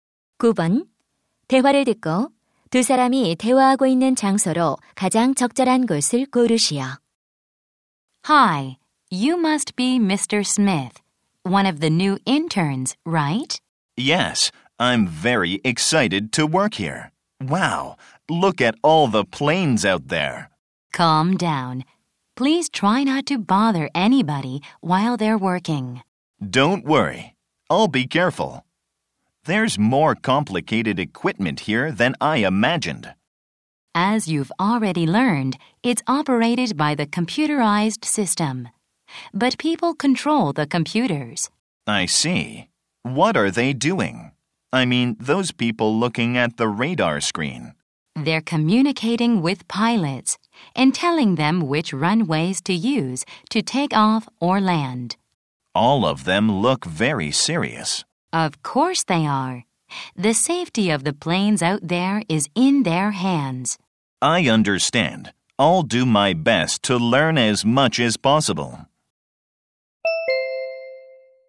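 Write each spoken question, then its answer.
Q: 대화를 듣고 두 사람이 대화하고 있는 장소로 가장 적절한 곳을 고르시오.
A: 공항 관제탑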